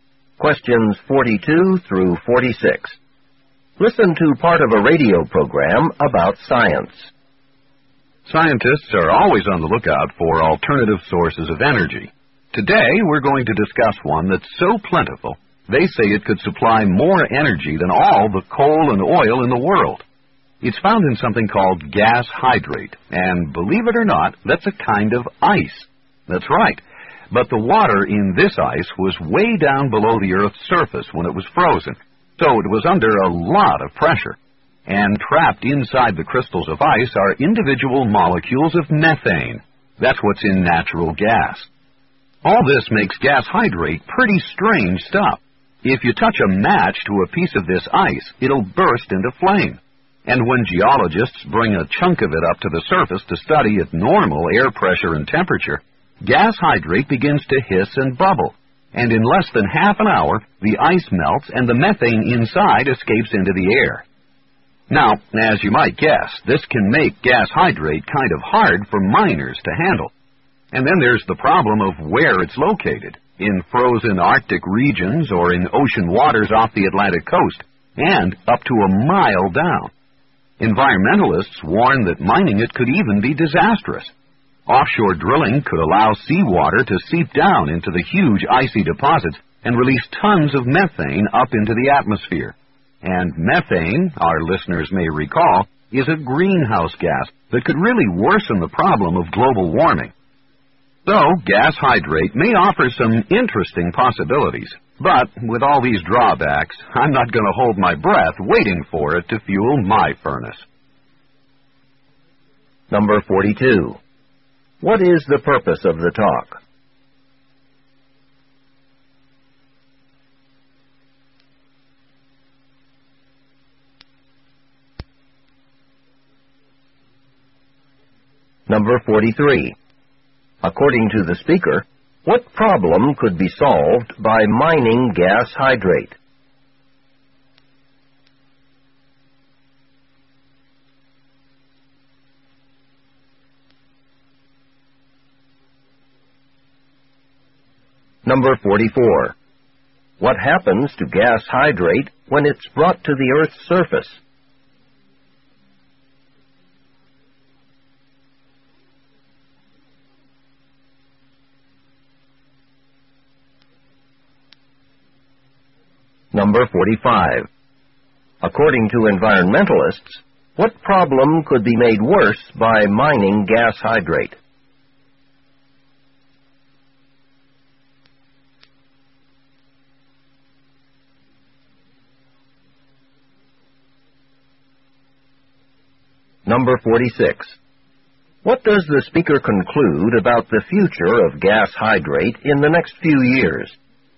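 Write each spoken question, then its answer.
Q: What is the purpose of the talk?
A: To discuss gas hydrate as a possible alternative energy source

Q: According to the speaker, what problem could be solved by mining gas hydrate?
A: The need for alternative sources of energy

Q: What happens to gas hydrate when it's brought to the Earth's surface?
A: It hisses, bubbles and melts, releasing methane

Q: According to environmentalists, what problem could be made worse by mining gas hydrate?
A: Global warming

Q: What does the speaker conclude about the future of gas hydrate in the next few years?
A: It is unlikely to be used as fuel soon because of its drawbacks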